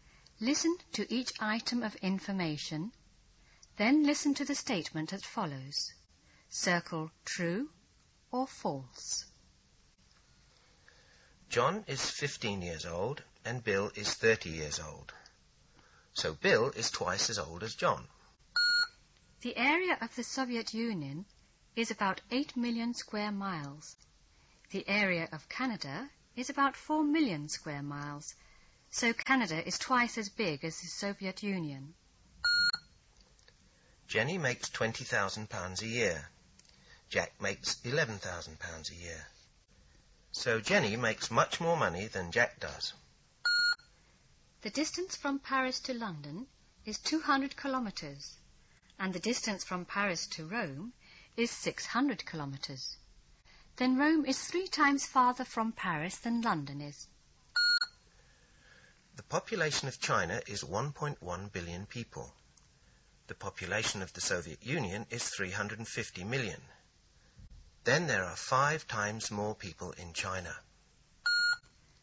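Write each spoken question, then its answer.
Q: So Bill is twice as old as John.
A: True

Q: so Canada is twice as big as the Soviet Union.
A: False

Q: So Jenny makes much more money than Jack does.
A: True

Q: Then Rome is 3 times farther from Paris than London is.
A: True

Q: Then there are 5 times more people in China.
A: False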